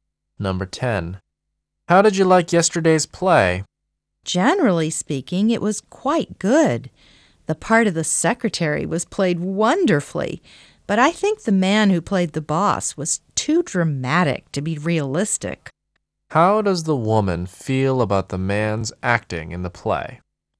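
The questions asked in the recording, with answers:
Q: How does the woman feel about the man's acting in the play?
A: He overacted; he was too dramatic to be realistic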